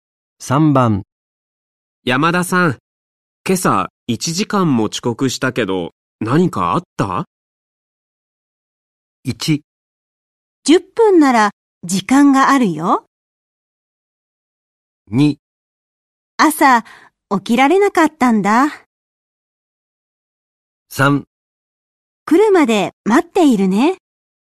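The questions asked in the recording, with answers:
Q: 山田さん、今朝1時間も遅刻したけど、何かあった?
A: 2: 朝起きられなかったんだ。

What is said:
2
朝起きられなかったんだ。
3
来るまで待っているね。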